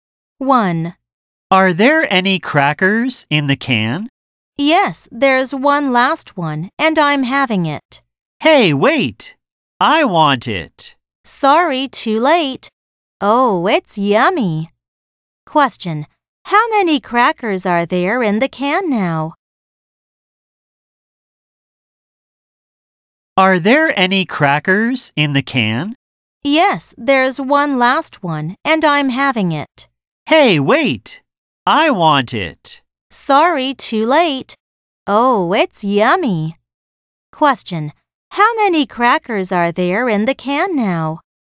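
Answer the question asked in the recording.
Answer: None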